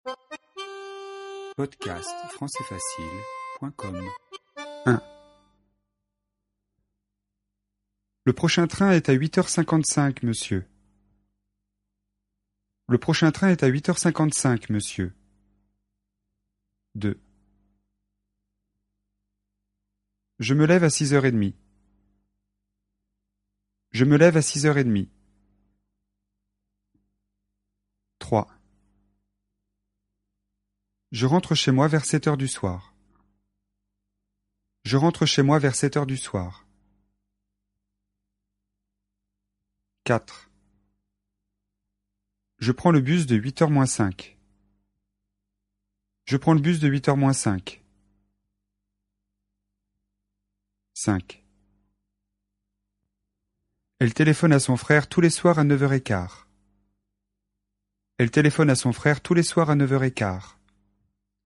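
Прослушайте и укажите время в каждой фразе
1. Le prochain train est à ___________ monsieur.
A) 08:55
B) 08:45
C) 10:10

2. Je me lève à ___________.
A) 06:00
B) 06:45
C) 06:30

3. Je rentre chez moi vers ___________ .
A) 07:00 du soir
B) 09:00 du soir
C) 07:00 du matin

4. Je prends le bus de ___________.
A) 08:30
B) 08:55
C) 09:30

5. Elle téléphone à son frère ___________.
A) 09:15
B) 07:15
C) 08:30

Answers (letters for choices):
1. A
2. C
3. A
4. B
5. A

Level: А1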